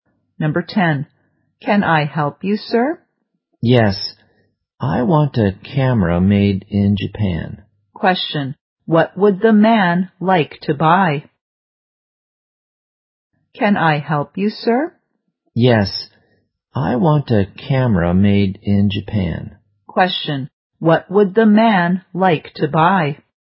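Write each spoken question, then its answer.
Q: What would the man like to buy?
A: A camera made in Japan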